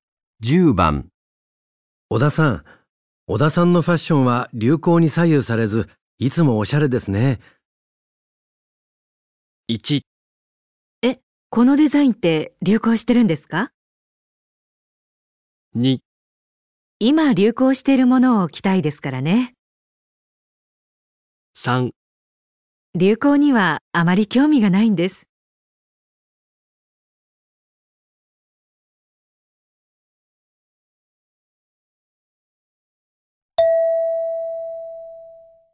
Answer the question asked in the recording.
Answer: 3

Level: N2 Listening · Test 3